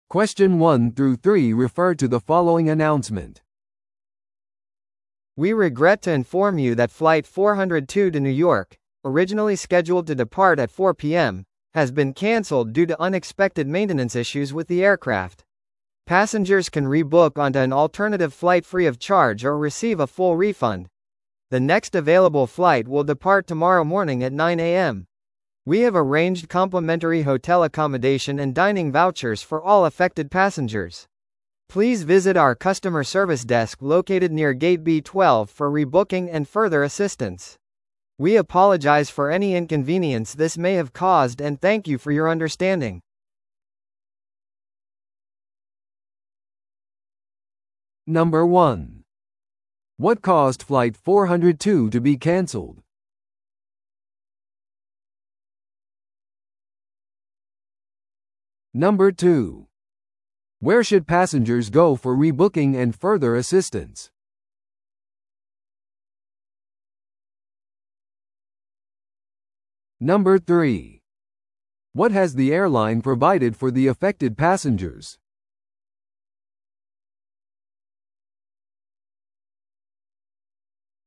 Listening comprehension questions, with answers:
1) What caused Flight 402 to be canceled?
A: 航空機のメンテナンス問題のため

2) Where should passengers go for rebooking and further assistance?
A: B12ゲート近くのカスタマーサービスデスク

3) What has the airline provided for the affected passengers?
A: 無料のホテル宿泊と食事券

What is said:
We regret to inform you that Flight 402 to New York, originally scheduled to depart at 4pm, has been canceled due to unexpected maintenance issues with the aircraft. Passengers can rebook onto an alternative flight free of charge or receive a full refund. The next available flight will depart tomorrow morning at 9am. We have arranged complimentary hotel accommodation and dining vouchers for all affected passengers. Please visit our customer service desk located near Gate B12 for rebooking and further assistance. We apologize for any inconvenience this may have caused and thank you for your understanding.